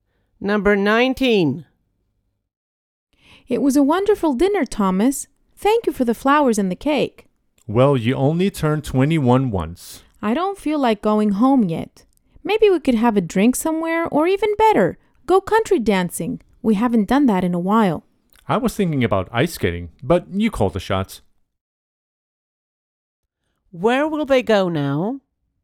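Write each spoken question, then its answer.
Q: Where will they go now?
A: Country dancing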